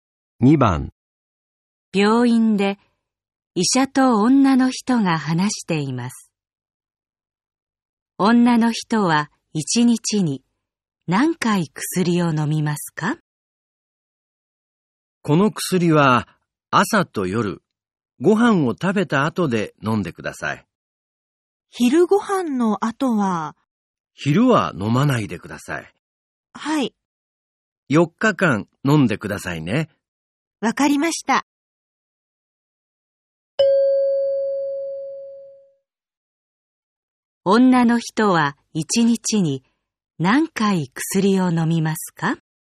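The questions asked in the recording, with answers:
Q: 女の人は1日に何回薬を飲みますか?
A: 2回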